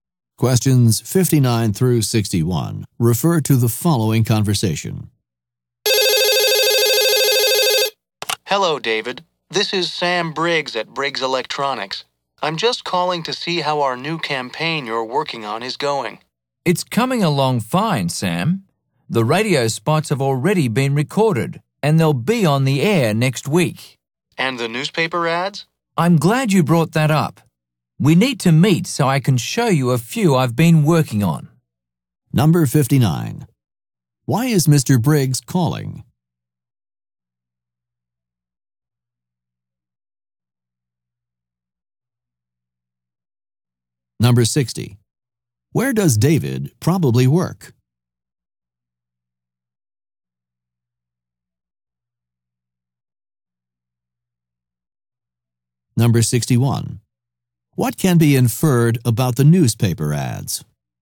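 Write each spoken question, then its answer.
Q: Why is Mr. Briggs calling?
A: To check on the progress of the new campaign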